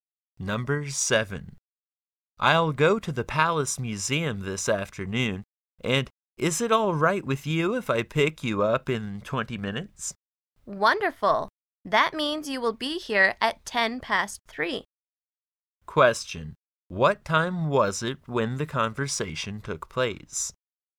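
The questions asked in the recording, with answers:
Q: What time was it when the conversation took place?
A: 2:50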